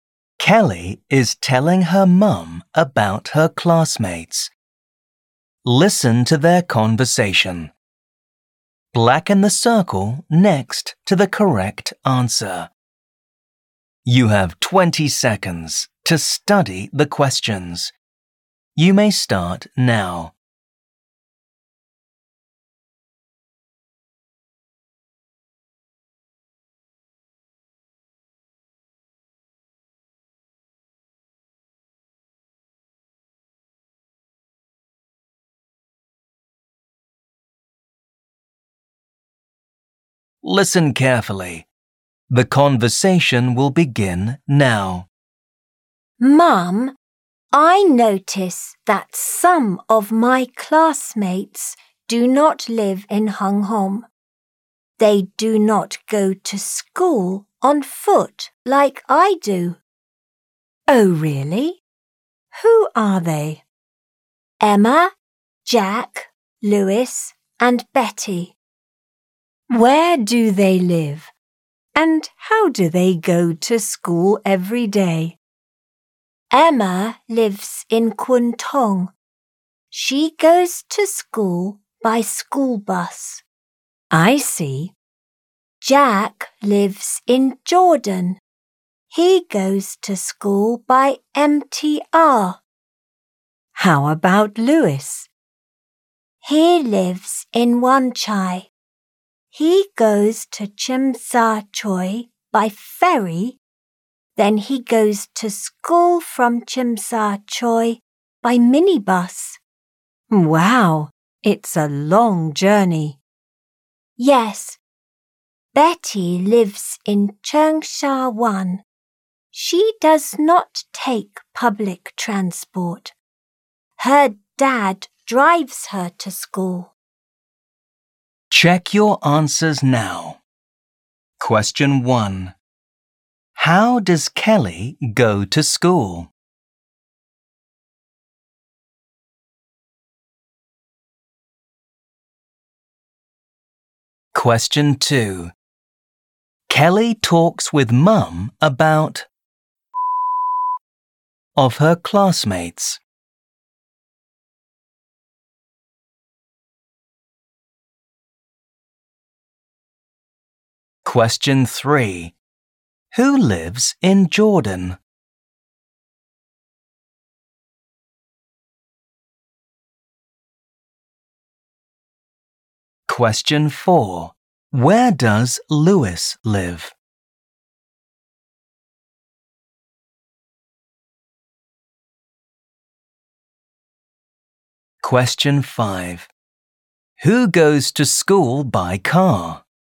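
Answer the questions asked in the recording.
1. On foot
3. Jack
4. Wan Chai
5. Betty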